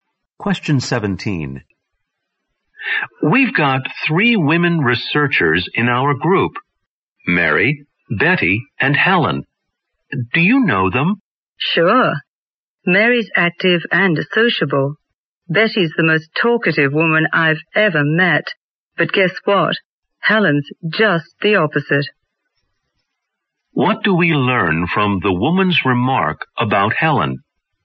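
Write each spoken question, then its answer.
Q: What do we learn from the woman's remark about Helen?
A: Helen is quiet and doesn't talk much.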